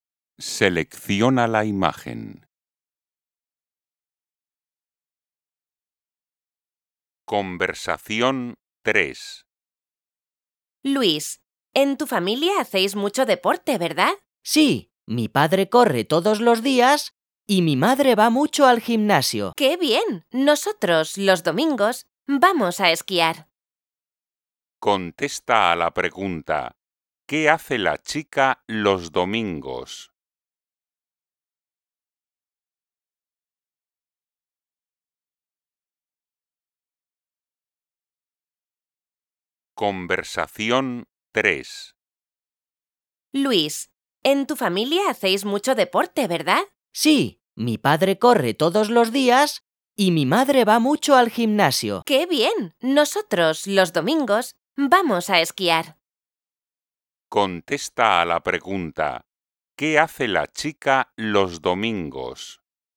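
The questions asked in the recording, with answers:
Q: ¿qué hace la chica los domingos?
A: va a esquiar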